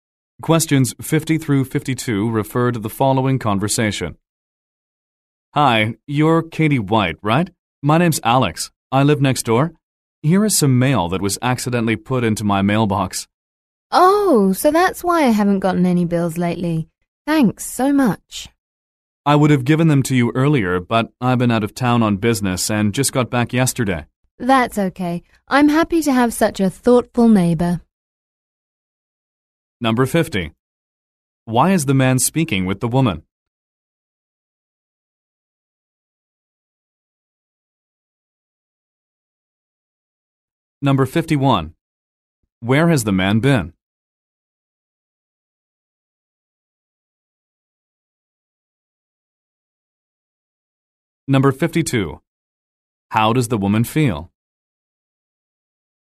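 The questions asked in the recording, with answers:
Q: Why is the man speaking with the woman?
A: To give her mail that was put in his mailbox

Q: Where has the man been?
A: Out of town on business

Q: How does the woman feel?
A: Grateful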